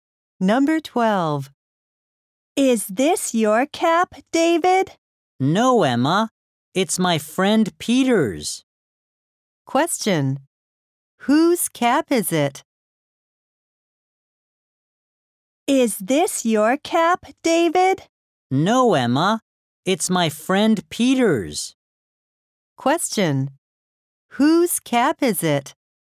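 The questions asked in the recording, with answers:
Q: Whose cap is it?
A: Peter's.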